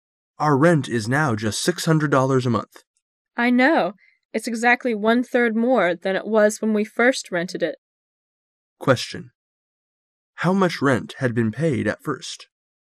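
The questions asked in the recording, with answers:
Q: How much rent had been paid at first?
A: $450 a month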